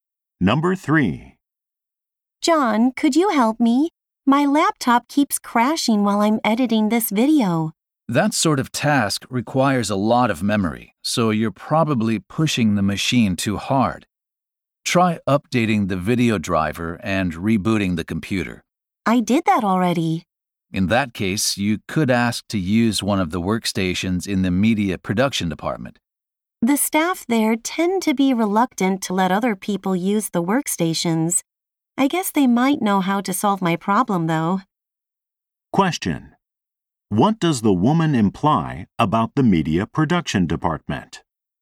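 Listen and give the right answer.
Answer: The staff there might not want to let her use their workstations.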